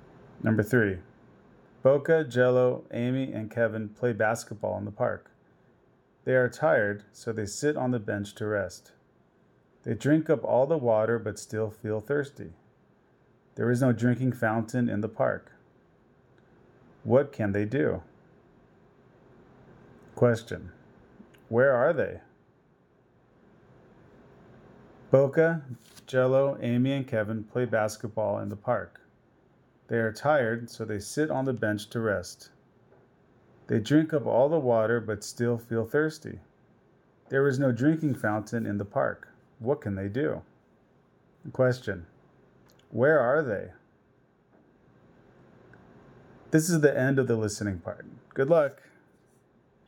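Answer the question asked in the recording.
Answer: In the park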